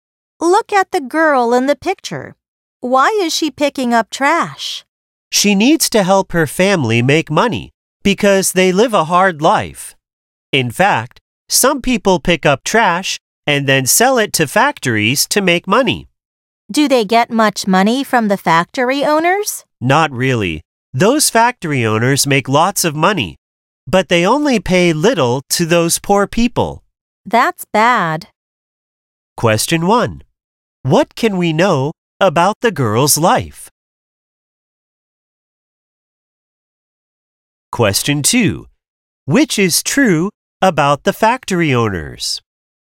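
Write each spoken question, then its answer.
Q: What can we know about the girl's life?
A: Her family lives a hard life.

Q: Which is true about the factory owners?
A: They make lots of money but pay little to the poor people.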